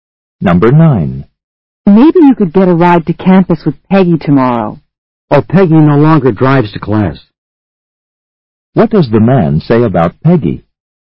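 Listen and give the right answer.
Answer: She no longer drives to class.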